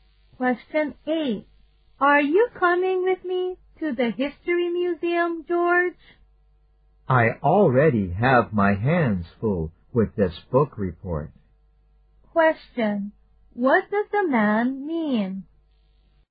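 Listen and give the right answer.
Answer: He can't go to the museum because he is busy with his book report.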